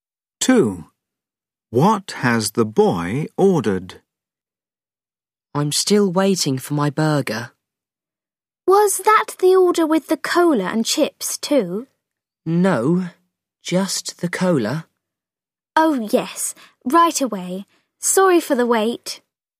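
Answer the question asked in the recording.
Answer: a burger and a cola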